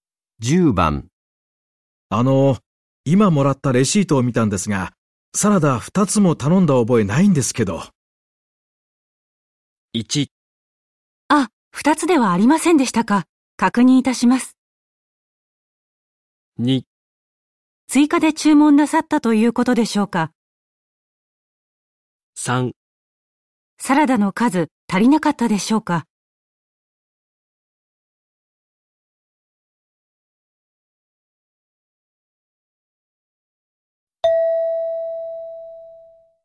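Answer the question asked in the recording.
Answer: 1: あ、2つではありませんでしたか。確認いたします。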